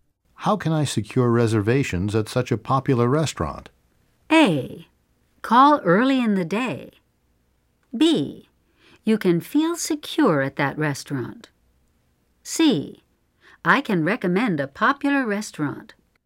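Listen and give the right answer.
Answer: A: Call early in the day.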